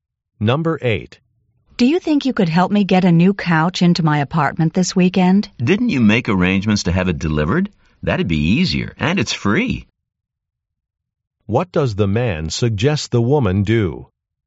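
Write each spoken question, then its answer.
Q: What does the man suggest the woman do?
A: Have the couch delivered.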